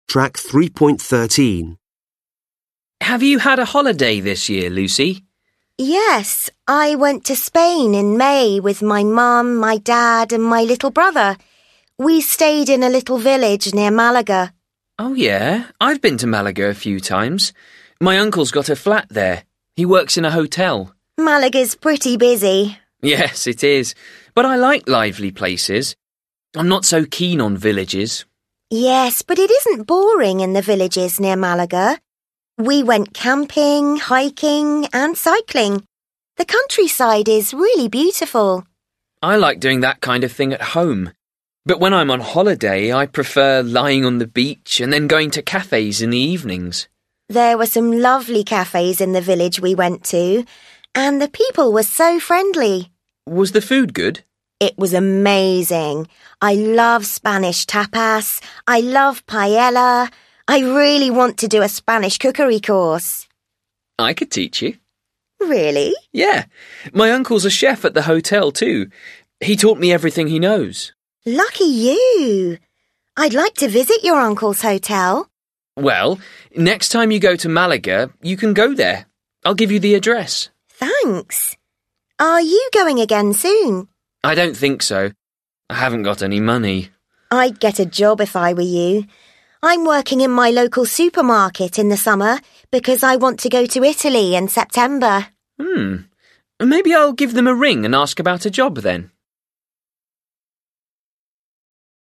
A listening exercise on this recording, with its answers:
Listen to the conversation twice. Decide if the statements are true or false. Write T or F.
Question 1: Lucy has a relative living in Spain.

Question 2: Ben prefers the town to the country.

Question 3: Ben prefers to relax when he is on holiday.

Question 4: Ben's uncle can teach Lucy Spanish cooking.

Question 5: Lucy tells Ben about a good hotel to stay at.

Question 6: Lucy gives Ben some advice about a job.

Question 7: Lucy is planning to return to Spain in September.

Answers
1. F
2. T
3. T
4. F
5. F
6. T
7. F

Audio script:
Ben: Have you had a holiday this year Lucy?
Lucy: Yes. I went to Spain in May with my mom, my dad and my little brother. We stayed in a little village near Malaga.
Ben: Oh yeah. I've been to Malaga a few times. My uncle's got a flat that he works in a hotel.
Lucy: Malaga's pretty busy.
Ben: Yes it is, but I like lively places. I'm not so keen on villages.
Lucy: Yes, but it isn't boring in the villages near Malaga. We went camping, hiking and cycling. The countryside is really beautiful.
Ben: I like doing that kind of thing at home, but when I'm on holiday I preferred lying on the beach and then going to cafes in the evenings.
Lucy: There was some lovely cafes in the village we went to, and the people were so friendly
Ben: Was the food good?
Lucy: It was amazing. I love Spanish Tapas I love Paella. I really want to do a Spanish cookery course.
Ben: I could teach you.
Lucy: Really?
Ben: Yes, my uncle's a chef at the hotel too. He taught me everything he knows.
Lucy: Lucky you. I'd like to visit your uncle's hotel.
Ben: Well next time you go to Malaga you can go there. I'll give you the address
Lucy: Thanks. Are you going again soon ?
Ben: I don't think so. I haven't got any money.
Lucy: I'd get a job if I were you. I'm working in my local supermarket in the summer because I want to go to Italy in September.
Ben: Maybe I'll give them a ring and ask about the job then.

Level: Lớp 10